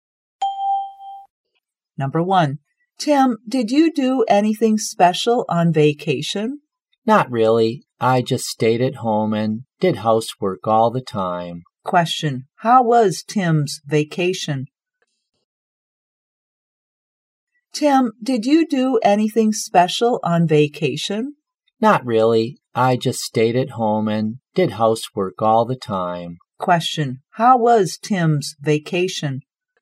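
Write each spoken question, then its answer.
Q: Question, how was Tim's vacation?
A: Not special; he stayed at home doing housework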